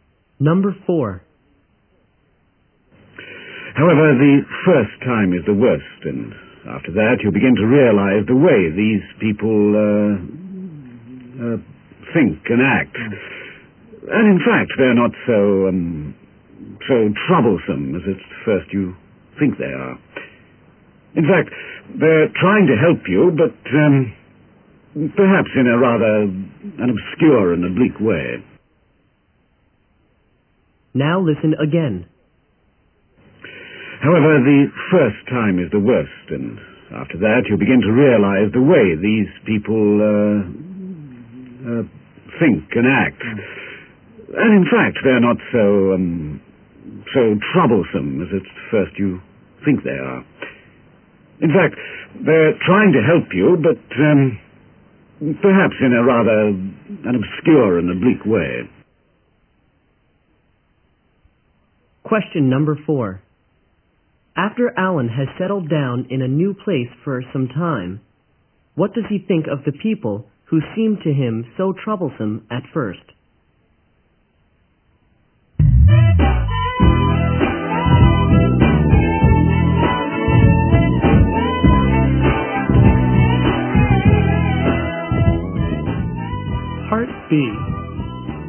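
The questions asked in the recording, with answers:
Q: After Alan has settled down in a new place for some time, what does he think of the people who seem to him so troublesome at first?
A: They are not so troublesome; they are trying to help, but in an obscure and oblique way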